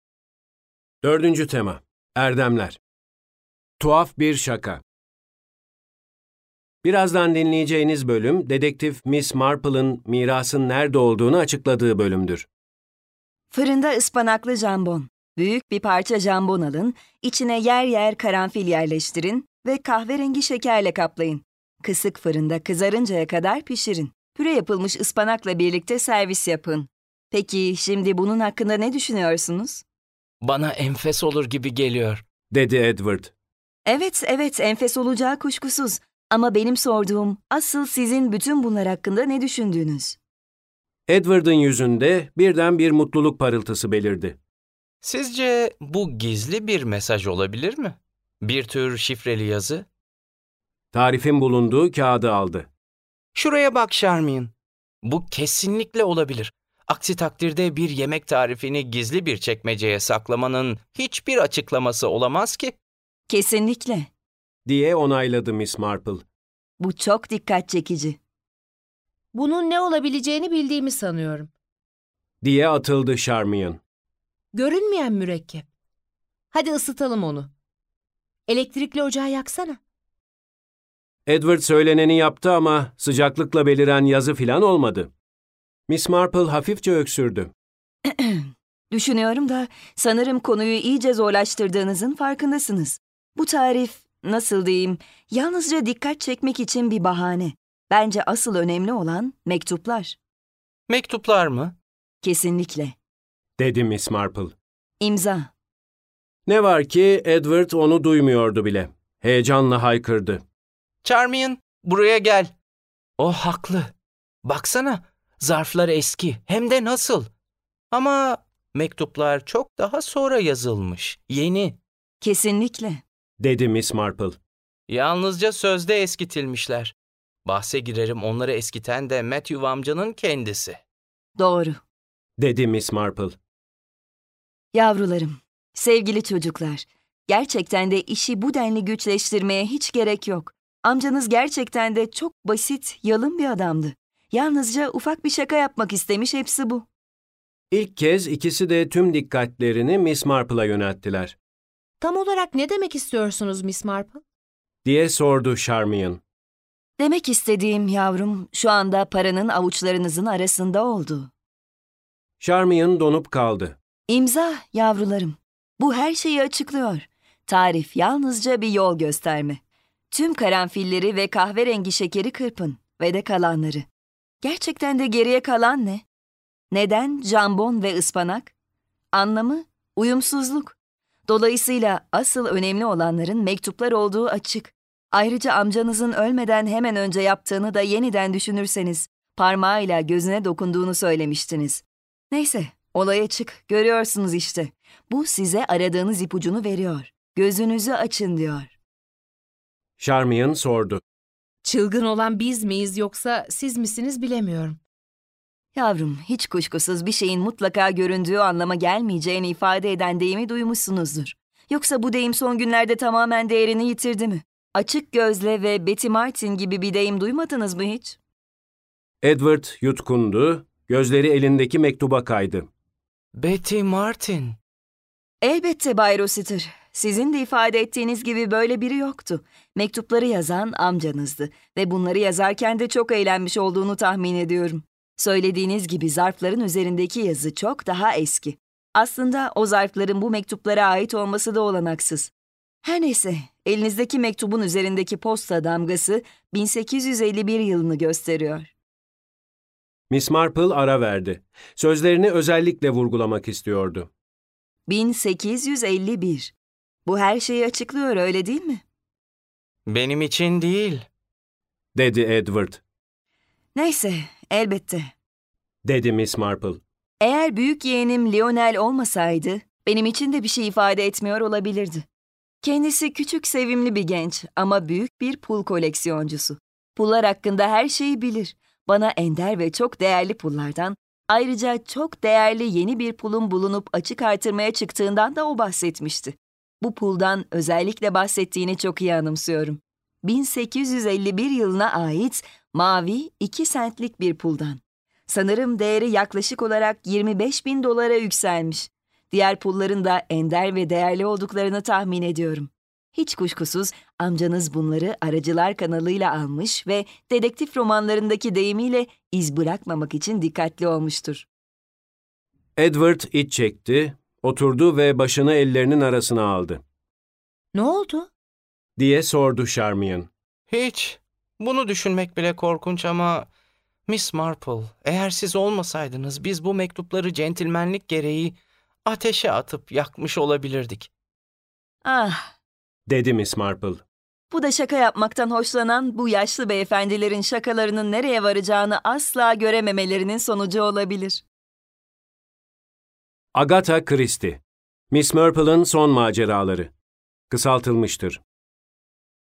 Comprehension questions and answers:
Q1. Dinlediğiniz metnin konusu nedir? Yazınız.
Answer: Aile büyüklerinden kalan mirasın yerini çözmeye çalışıldığı anlatılmıştır.

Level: 7. Sınıf